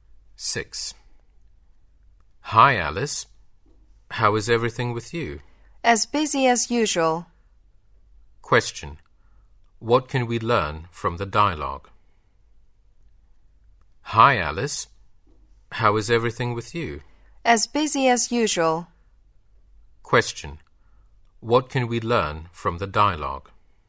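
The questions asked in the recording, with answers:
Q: What can we learn from the dialogue?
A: Alice is as busy as usual.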